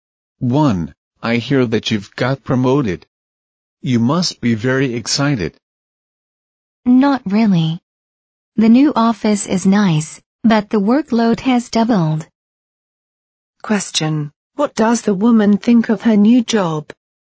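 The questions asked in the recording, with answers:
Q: What does the woman think of her new job?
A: She isn't very happy with it because the workload has doubled.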